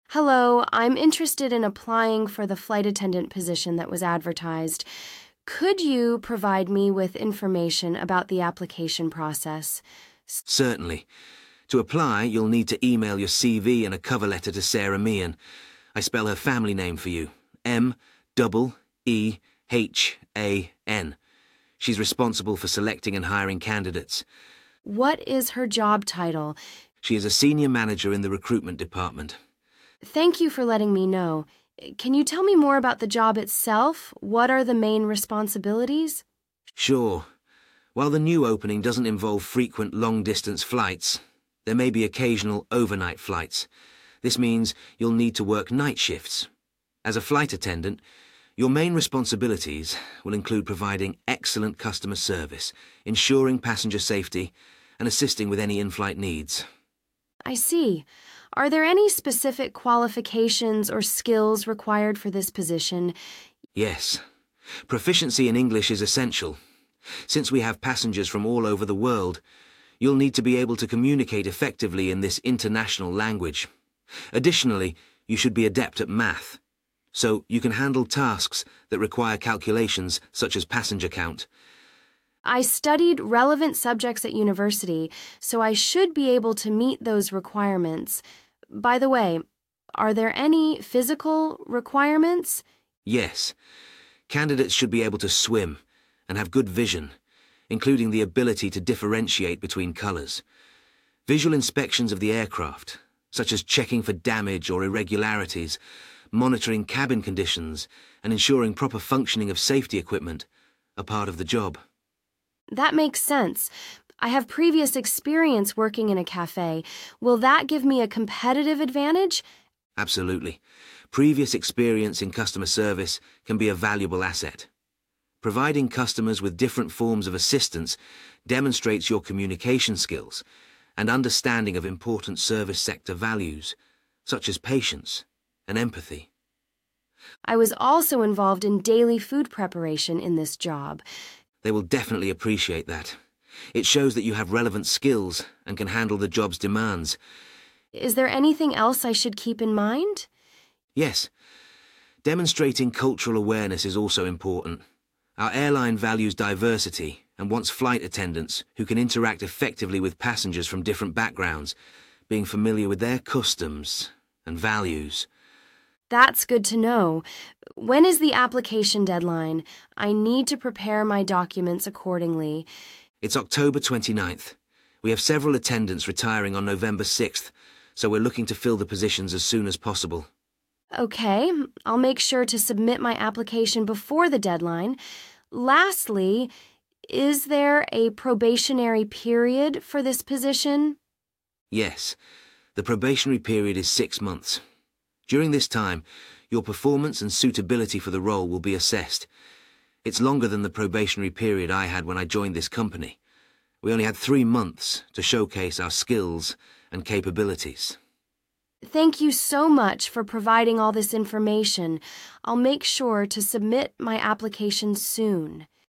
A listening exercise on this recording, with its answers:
Write no more than two words and/or a number for each answer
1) Name: Sara [1]_____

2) Place: [2]_______Department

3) Occasionally cover [3.] _______shifts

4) Good at English as well as [4.]_______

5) Have good [5.]_______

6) Helping [6.]_______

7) Preparing [7.]_______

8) Important to show [8.]_______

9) Submit the application no later than [9.]_______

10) Probation period: [10.]_______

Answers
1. Meehan
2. recruitment
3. night
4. math
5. vision
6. customers
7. food
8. cultural awareness
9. October 29th
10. 6 months